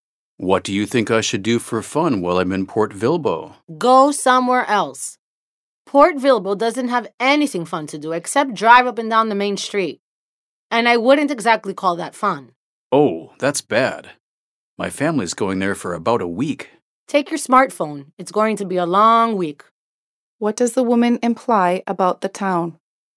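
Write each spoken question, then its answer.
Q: What does the woman imply about the town?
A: It is boring; there is nothing fun to do there.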